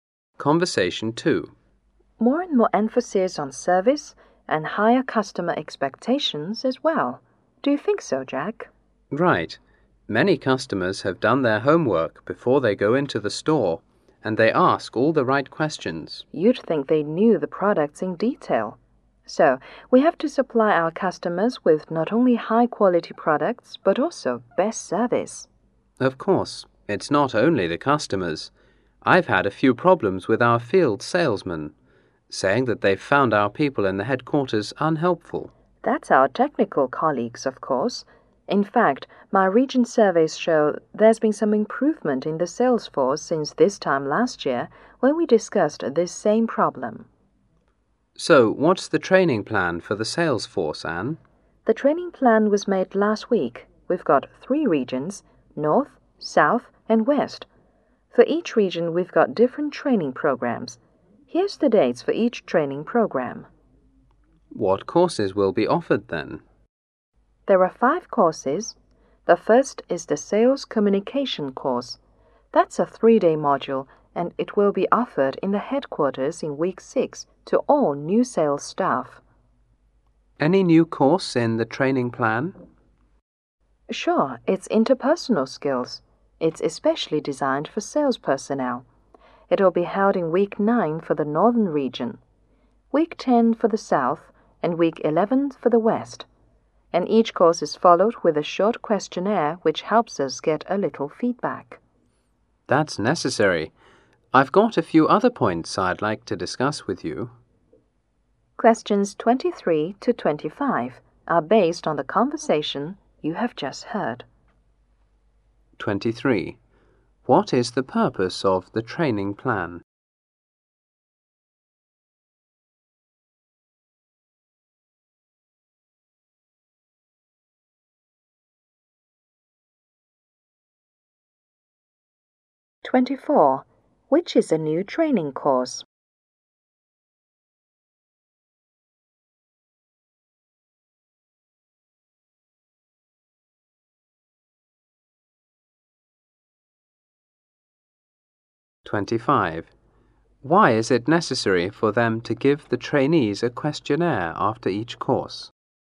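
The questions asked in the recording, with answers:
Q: Which is a new training course?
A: Interpersonal skills.

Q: Why is it necessary for them to give the trainees a questionnaire after each course?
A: To get some feedback.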